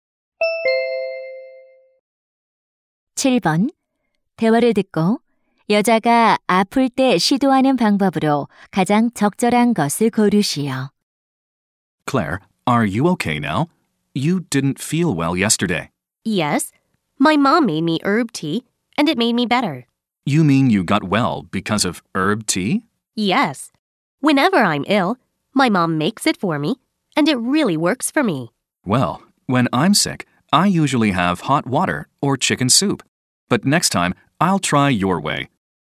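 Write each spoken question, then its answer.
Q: 여자가 아플 때 시도하는 방법으로 가장 적절한 것을 고르시오.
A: 허브차 마시기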